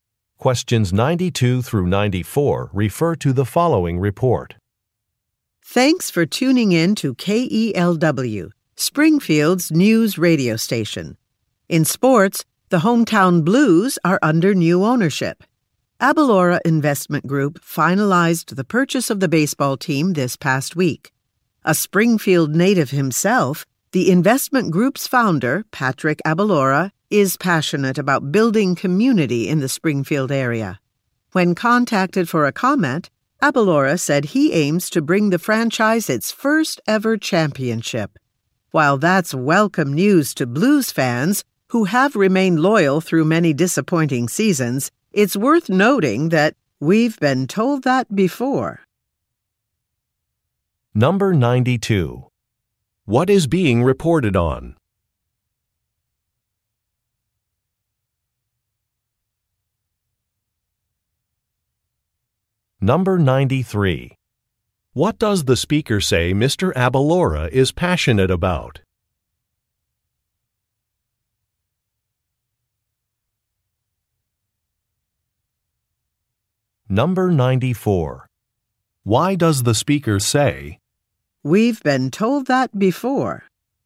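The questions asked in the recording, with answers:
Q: What is being reported on?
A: The sale of a baseball team

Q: What does the speaker say Mr.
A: Building community in the Springfield area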